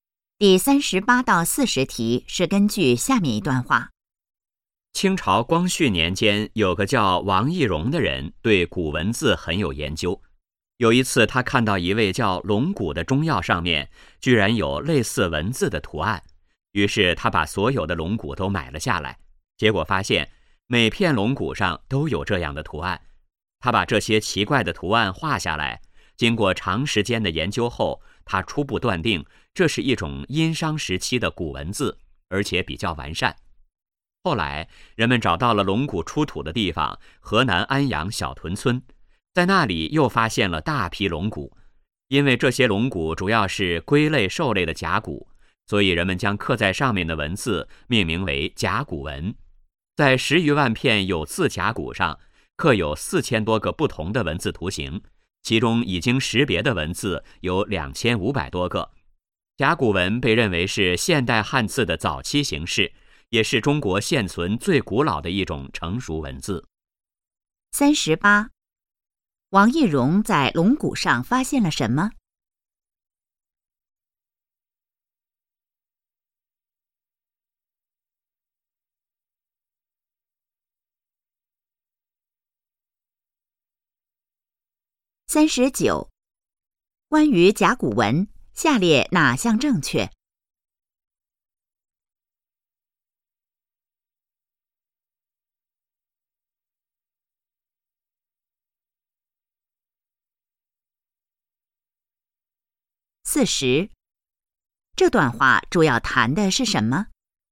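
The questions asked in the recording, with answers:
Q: 王懿荣在龙骨上发现了什么?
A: 类似文字的图案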